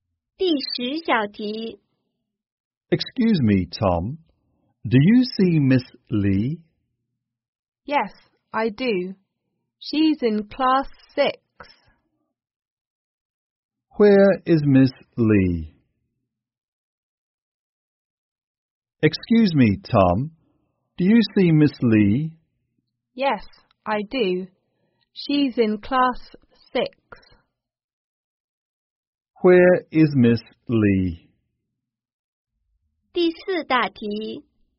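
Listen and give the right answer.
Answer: In Class 6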